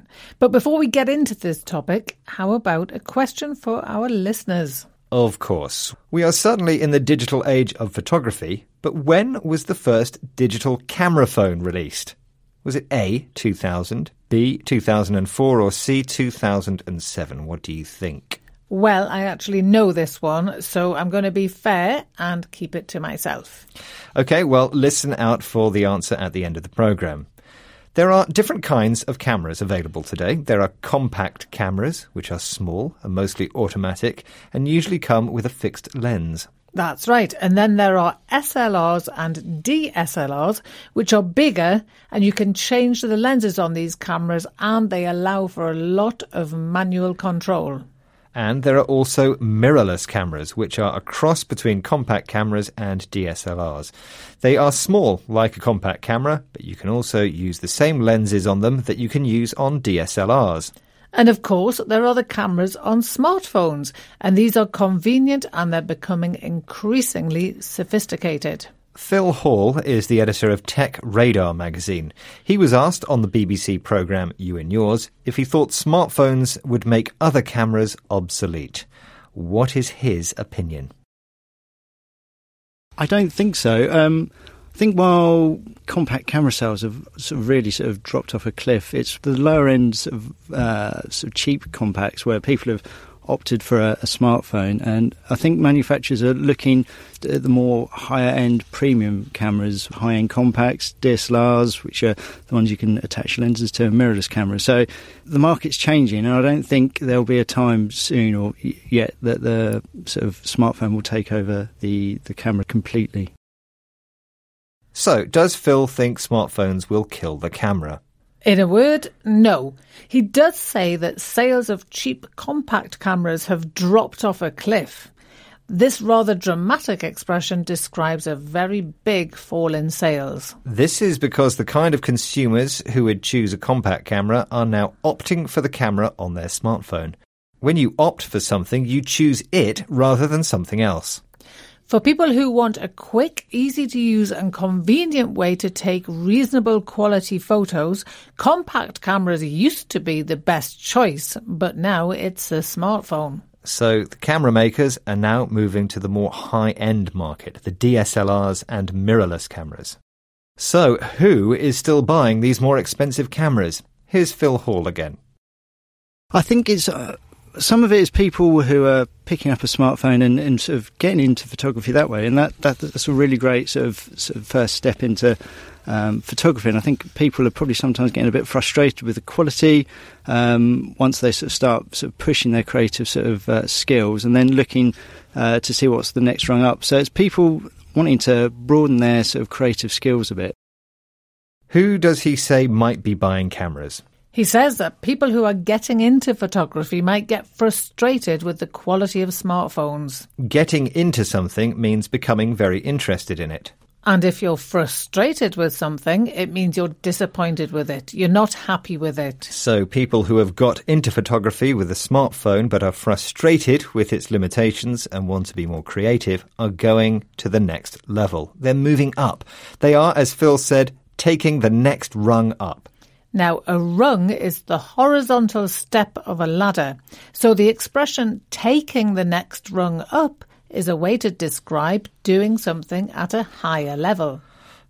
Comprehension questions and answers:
Listen to the audio below and answer the following questions –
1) When was the first digital camera introduced?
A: 2000

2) Who is the editor of Tech Radar magazine?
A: Phil Hall

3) Which expression is used to describe a big fall in sales?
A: dropped off a cliff

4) Which expression is used to explain that you have chosen something over something else?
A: opt for

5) What expression is used to show that you are disappointed with something?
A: frustrated

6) Which expression is used to show that you are becoming interested in something?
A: getting into

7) What expression does the author use to show that something is moving at a higher level?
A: taking the next rung up